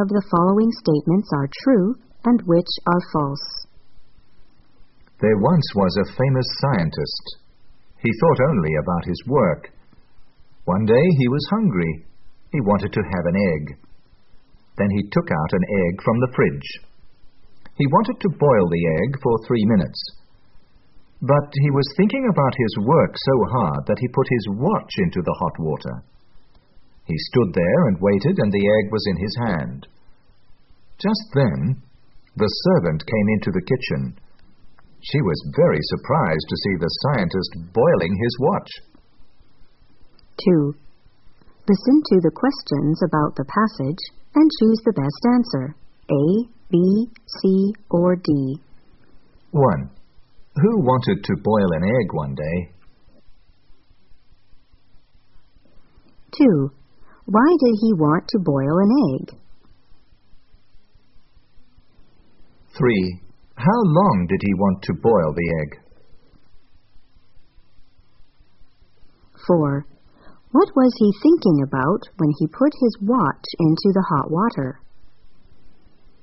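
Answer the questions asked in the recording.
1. A famous scientist
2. Because he was hungry
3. For 3 minutes
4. His work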